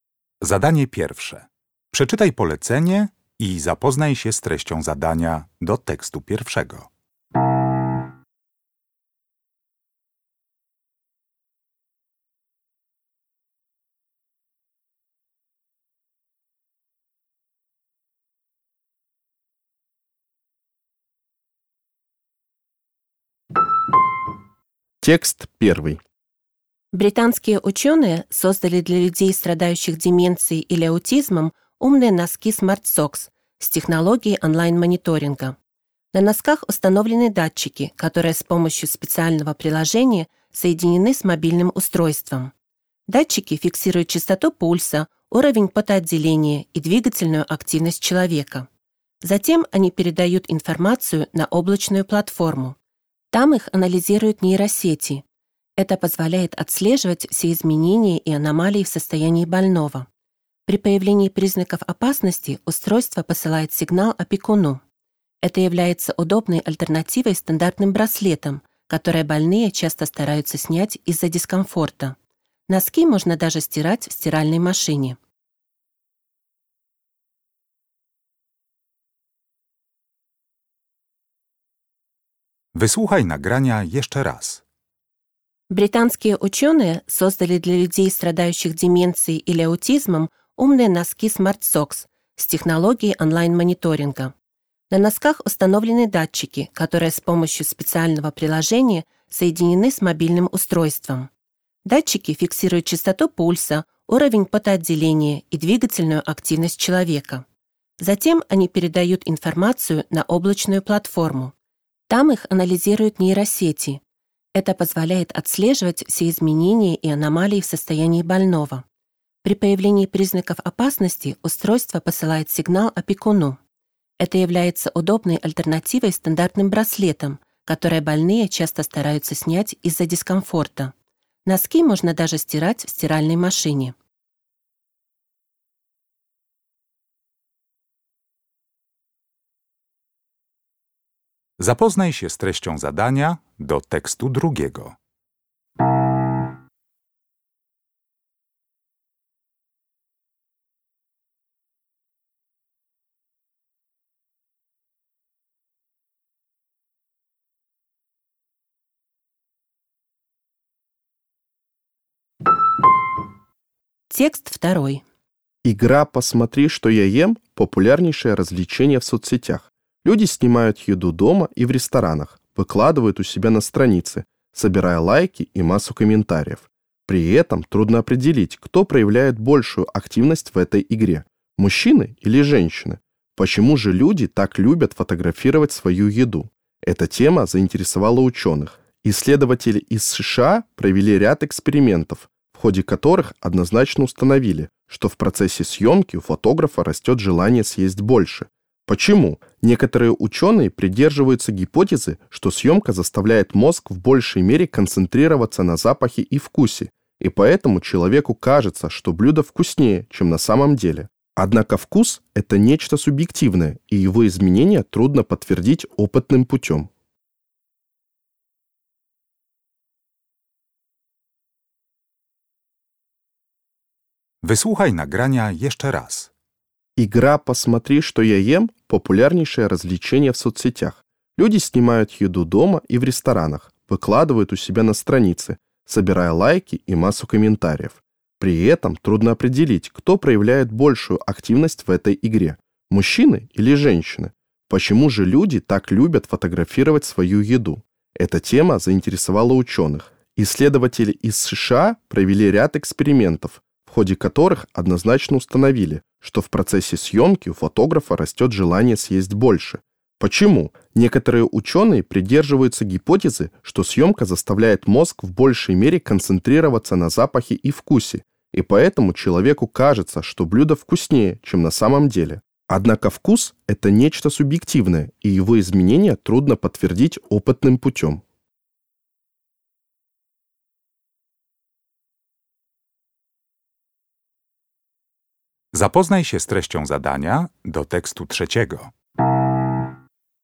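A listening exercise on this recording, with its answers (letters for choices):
W zadaniach 1.1. i 1.2. zaznacz jedną z liter: A, B albo C.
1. Автор текста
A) объясняет принцип работы технической новинки.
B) даёт советы по поддержке двигательной активности.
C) предупреждает об изменениях в мобильном приложении.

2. Какое из предложений является фактом, а не субъективным мнением?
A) Съёмка блюда усиливает внимание мозга к вкусовым ощущениям.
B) Женщины фотографируют свои блюда чаще, чем мужчины.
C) Фотографирование еды увеличивает аппетит.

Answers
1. A
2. C

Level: Poziom: rozszerzony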